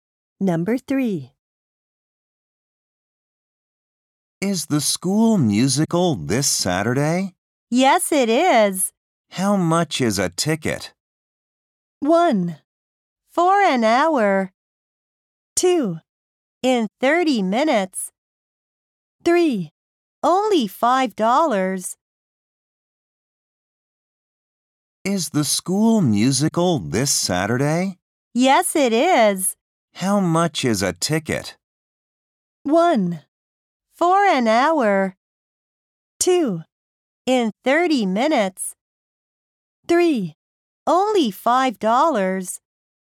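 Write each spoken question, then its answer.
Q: How much is a ticket?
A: 3: Only $5.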